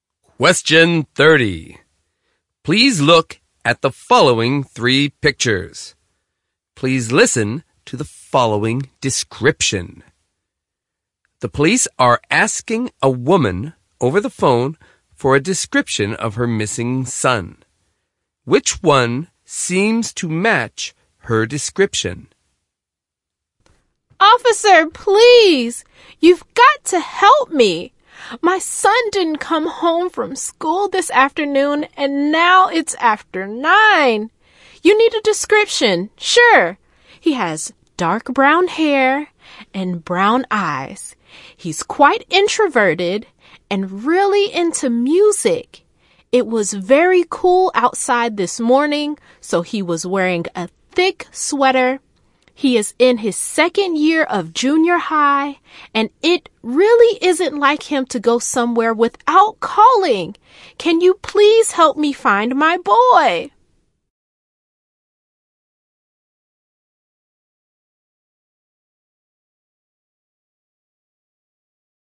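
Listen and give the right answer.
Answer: A junior high boy with dark brown hair and brown eyes wearing a thick sweater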